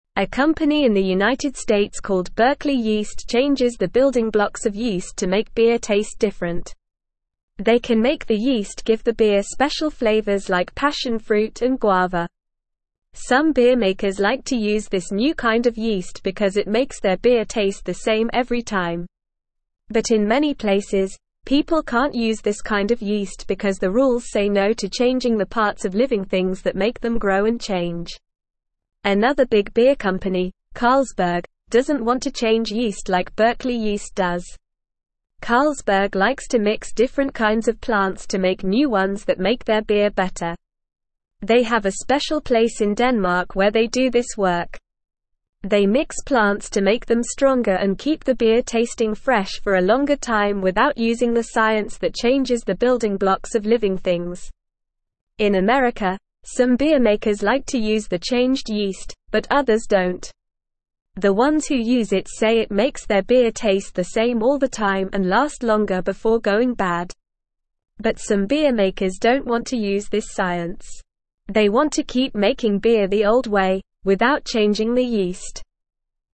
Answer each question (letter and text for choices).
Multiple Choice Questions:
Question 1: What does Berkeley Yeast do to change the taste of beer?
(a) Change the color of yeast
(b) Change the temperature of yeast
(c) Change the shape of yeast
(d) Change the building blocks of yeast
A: (d) Change the building blocks of yeast

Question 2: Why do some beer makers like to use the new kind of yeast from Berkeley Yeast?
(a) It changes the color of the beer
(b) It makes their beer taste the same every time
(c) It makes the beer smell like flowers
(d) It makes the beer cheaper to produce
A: (b) It makes their beer taste the same every time

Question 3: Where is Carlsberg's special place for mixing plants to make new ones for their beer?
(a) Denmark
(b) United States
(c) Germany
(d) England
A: (a) Denmark

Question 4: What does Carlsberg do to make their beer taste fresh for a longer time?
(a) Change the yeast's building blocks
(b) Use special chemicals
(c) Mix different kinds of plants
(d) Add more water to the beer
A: (c) Mix different kinds of plants

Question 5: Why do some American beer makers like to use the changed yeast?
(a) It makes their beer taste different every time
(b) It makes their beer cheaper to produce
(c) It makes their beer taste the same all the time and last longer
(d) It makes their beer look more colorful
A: (c) It makes their beer taste the same all the time and last longer

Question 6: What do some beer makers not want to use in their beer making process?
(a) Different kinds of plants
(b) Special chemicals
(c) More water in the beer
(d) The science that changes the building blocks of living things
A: (d) The science that changes the building blocks of living things

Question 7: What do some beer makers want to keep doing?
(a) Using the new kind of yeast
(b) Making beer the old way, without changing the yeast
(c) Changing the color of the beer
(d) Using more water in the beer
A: (b) Making beer the old way, without changing the yeast

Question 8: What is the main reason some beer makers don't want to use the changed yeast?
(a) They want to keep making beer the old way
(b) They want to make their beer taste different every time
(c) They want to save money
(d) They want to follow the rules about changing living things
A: (a) They want to keep making beer the old way

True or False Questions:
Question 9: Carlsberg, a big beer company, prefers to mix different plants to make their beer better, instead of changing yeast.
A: True

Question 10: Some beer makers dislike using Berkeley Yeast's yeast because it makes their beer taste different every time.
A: False

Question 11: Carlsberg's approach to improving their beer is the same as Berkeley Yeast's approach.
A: False

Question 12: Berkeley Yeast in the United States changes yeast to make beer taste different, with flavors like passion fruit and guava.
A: True

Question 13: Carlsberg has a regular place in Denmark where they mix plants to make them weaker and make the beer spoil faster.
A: False

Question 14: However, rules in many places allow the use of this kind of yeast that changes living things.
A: False

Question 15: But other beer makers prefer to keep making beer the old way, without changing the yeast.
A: True

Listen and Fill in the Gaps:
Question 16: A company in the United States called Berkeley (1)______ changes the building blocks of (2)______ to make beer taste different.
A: Yeast

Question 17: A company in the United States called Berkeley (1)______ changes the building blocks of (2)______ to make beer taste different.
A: yeast

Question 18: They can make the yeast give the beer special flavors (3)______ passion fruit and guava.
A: like

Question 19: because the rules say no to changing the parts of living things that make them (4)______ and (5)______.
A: grow

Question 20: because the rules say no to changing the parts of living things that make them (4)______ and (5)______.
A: change

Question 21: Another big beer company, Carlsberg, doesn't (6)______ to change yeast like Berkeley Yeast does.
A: want

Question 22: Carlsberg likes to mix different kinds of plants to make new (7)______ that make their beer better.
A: ones

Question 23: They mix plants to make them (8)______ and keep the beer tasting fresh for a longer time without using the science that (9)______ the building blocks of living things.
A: stronger

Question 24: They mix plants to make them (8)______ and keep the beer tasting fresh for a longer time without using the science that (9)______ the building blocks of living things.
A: changes

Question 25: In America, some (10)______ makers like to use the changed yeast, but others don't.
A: beer

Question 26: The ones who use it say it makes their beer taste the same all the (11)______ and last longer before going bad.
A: time

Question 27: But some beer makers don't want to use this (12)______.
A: science

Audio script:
A company in the United States called Berkeley Yeast changes the building blocks of yeast to make beer taste different. They can make the yeast give the beer special flavors like passion fruit and guava. Some beer makers like to use this new kind of yeast because it makes their beer taste the same every time. But in many places, people can't use this kind of yeast because the rules say no to changing the parts of living things that make them grow and change.
Another big beer company, Carlsberg, doesn't want to change yeast like Berkeley Yeast does. Carlsberg likes to mix different kinds of plants to make new ones that make their beer better. They have a special place in Denmark where they do this work. They mix plants to make them stronger and keep the beer tasting fresh for a longer time without using the science that changes the building blocks of living things.
In America, some beer makers like to use the changed yeast, but others don't. The ones who use it say it makes their beer taste the same all the time and last longer before going bad. But some beer makers don't want to use this science. They want to keep making beer the old way, without changing the yeast.

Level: Level 2